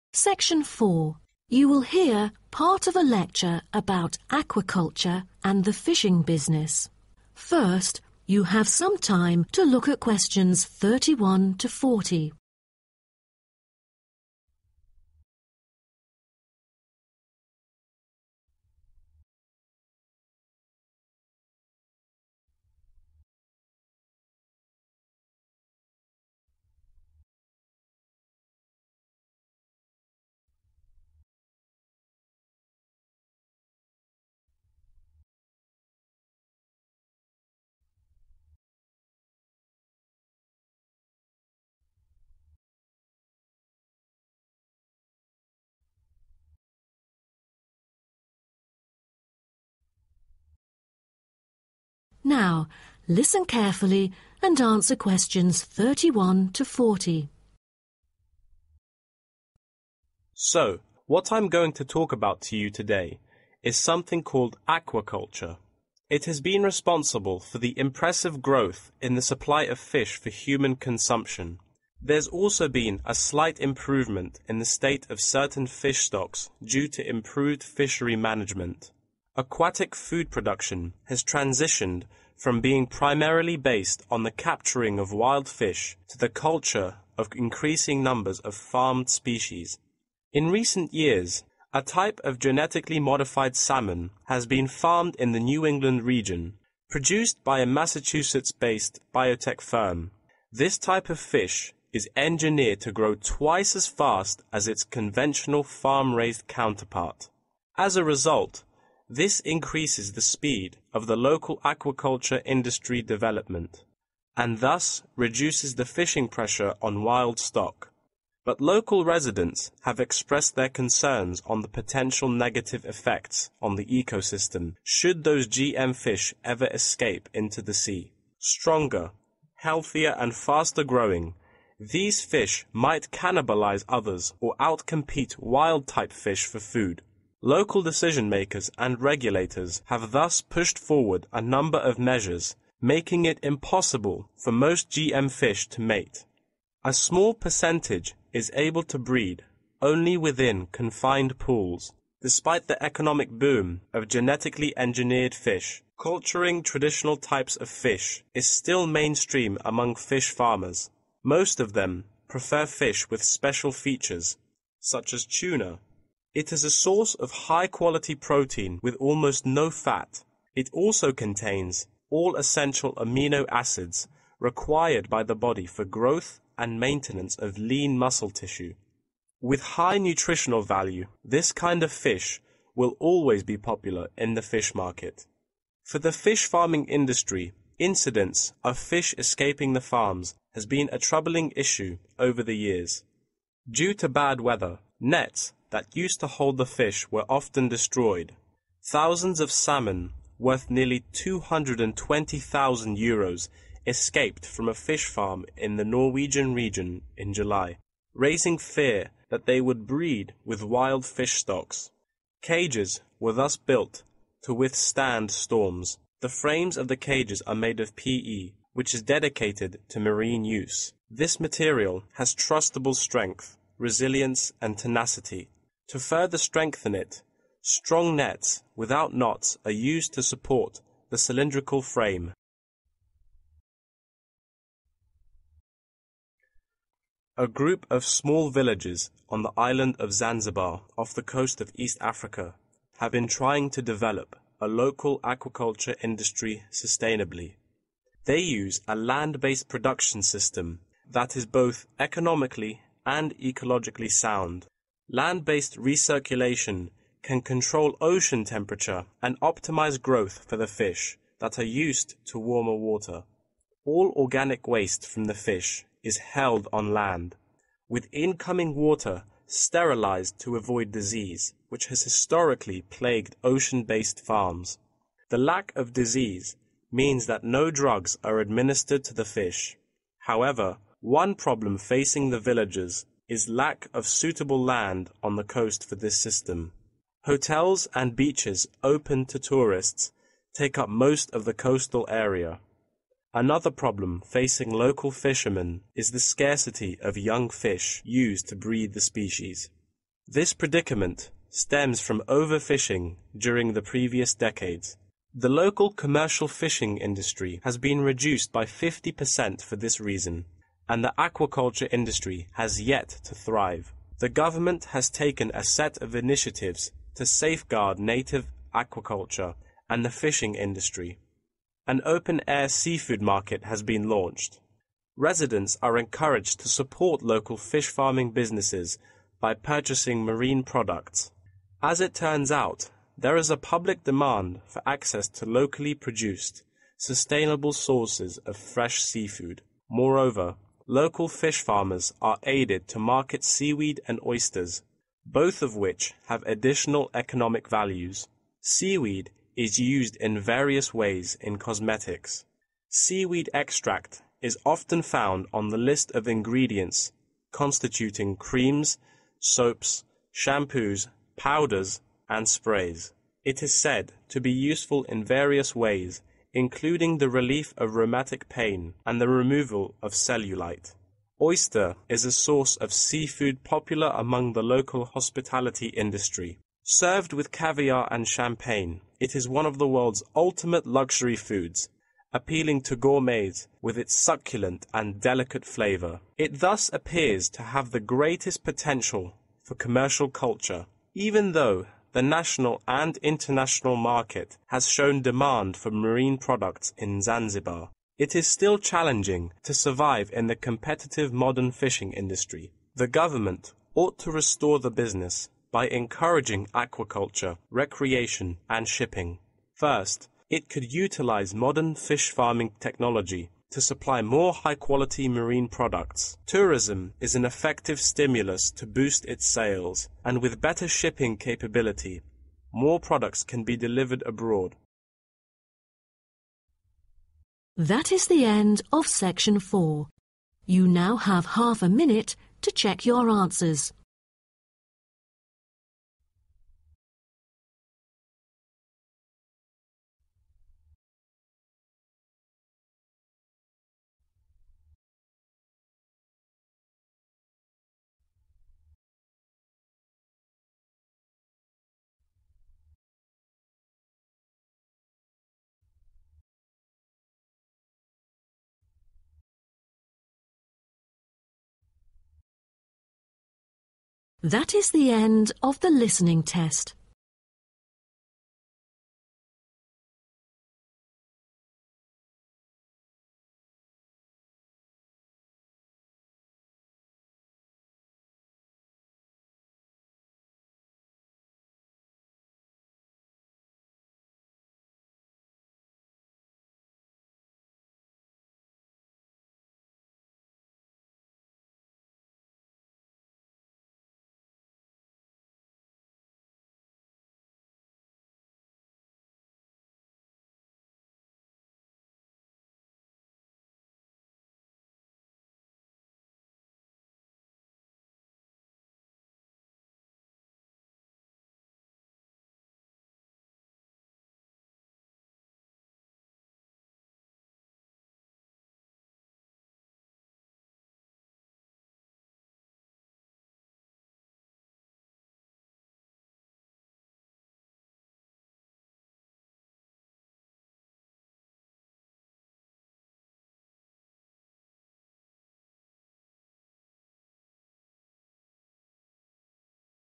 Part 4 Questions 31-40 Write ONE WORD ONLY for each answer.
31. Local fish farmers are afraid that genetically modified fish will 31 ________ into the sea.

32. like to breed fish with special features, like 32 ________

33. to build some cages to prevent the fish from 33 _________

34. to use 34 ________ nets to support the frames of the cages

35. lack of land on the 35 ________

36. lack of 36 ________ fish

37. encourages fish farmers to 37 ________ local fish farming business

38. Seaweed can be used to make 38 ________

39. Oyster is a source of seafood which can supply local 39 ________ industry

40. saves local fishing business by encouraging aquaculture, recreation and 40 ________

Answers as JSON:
{"31": "escape", "32": "tuna", "33": "storms", "34": "strong", "35": "coast", "36": "young", "37": "support", "38": "cosmetics", "39": "hospitality", "40": "shipping"}